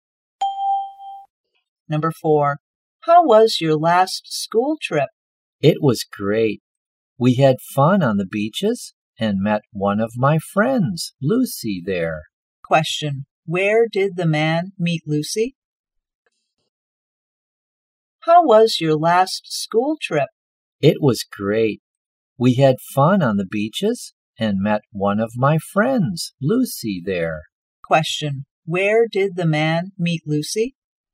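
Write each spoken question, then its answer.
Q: where did the man meet Lucy?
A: On the beach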